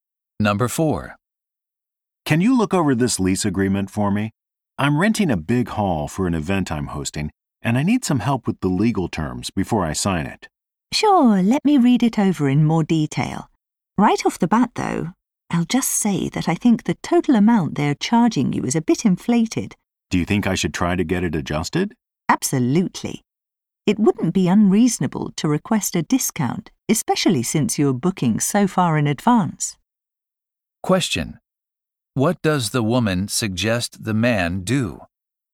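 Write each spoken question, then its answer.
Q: What does the woman suggest the man do?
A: Ask for a discount on the hall rental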